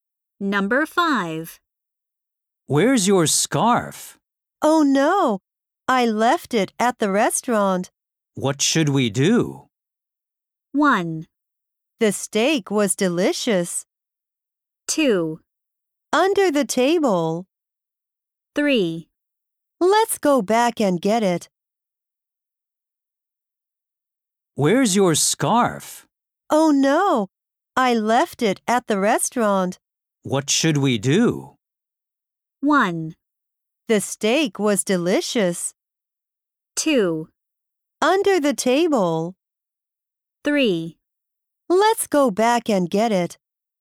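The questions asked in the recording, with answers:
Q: What should we do?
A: 3: Let's go back and get it.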